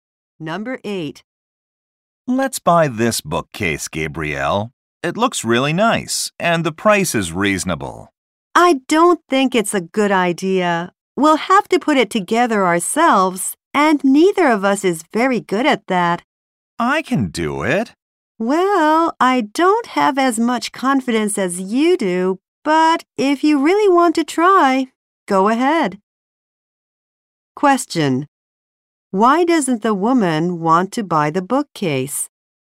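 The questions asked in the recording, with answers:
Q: Why doesn't the woman want to buy the bookcase?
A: They would have to put it together themselves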